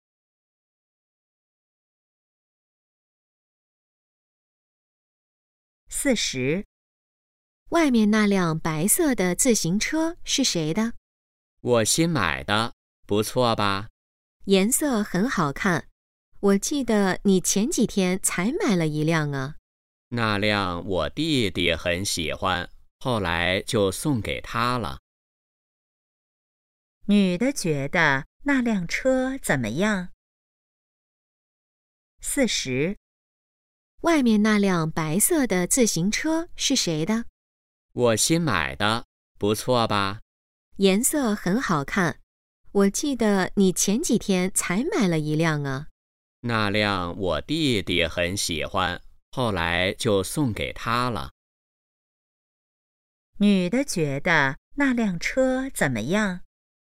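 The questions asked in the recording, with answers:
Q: 女的觉得那辆车怎么样?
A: 颜色很好看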